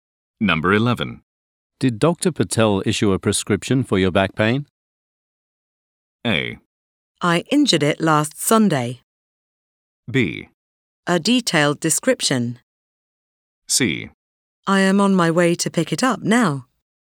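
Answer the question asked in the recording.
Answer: C: I am on my way to pick it up now.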